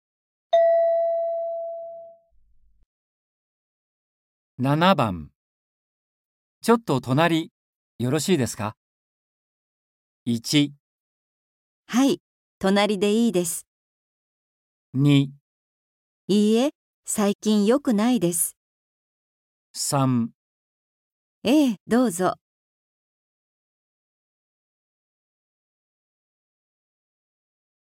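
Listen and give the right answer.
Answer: 3

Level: N4.36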